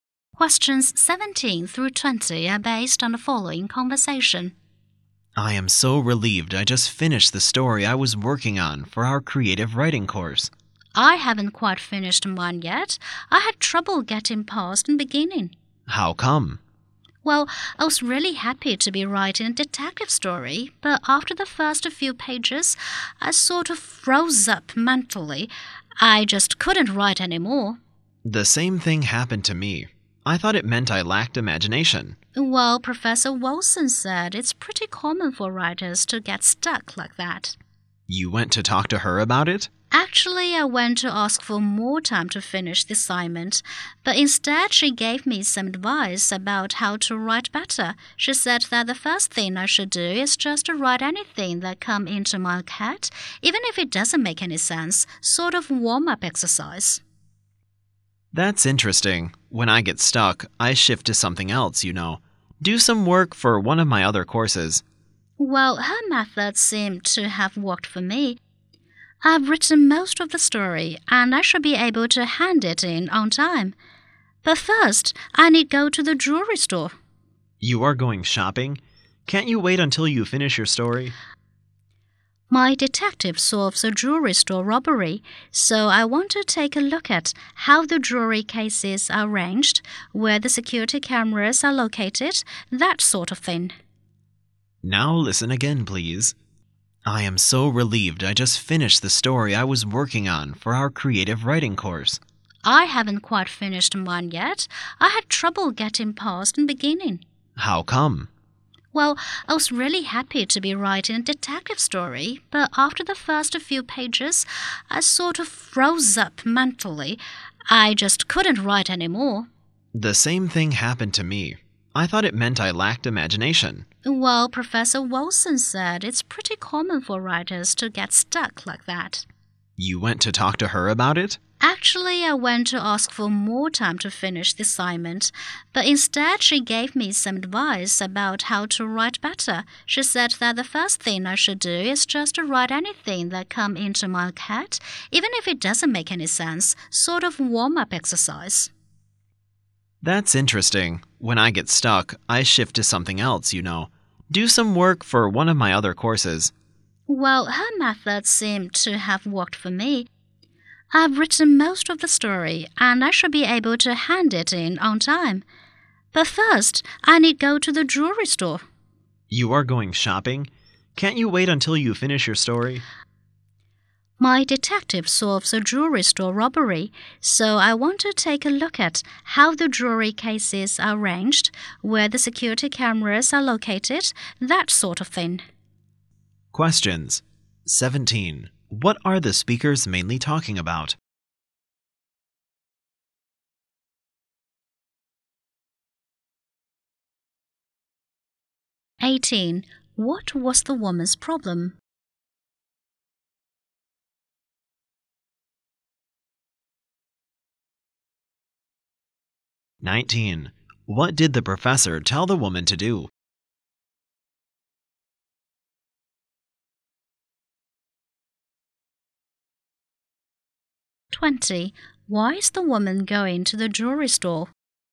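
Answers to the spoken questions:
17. Writing stories for their creative writing course
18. She got stuck after the first few pages of her story
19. Write anything that comes into her head as a warm-up
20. To research details for her detective story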